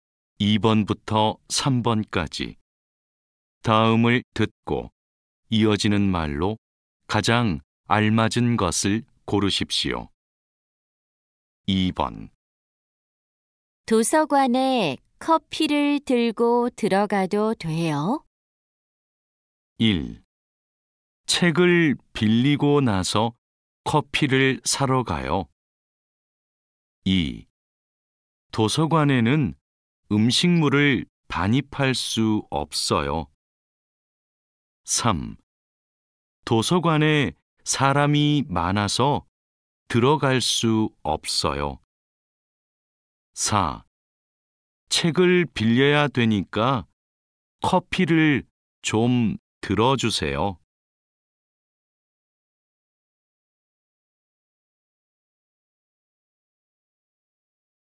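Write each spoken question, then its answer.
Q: 도서관에 커피를 들고 들어가도 돼요?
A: 2: 도서관에는 음식물을 반입할 수 없어요.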